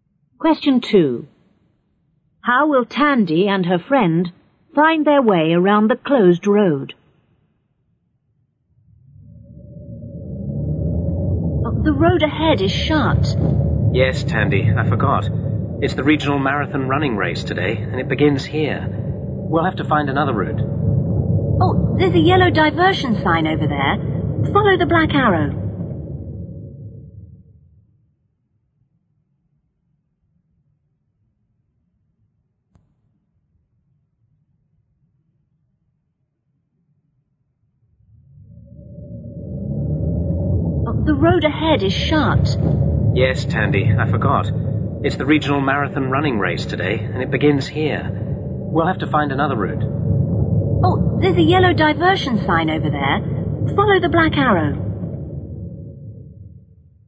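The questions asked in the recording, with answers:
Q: How will Tandy and her friend find their way around the closed road?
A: Follow the black arrow on the yellow diversion sign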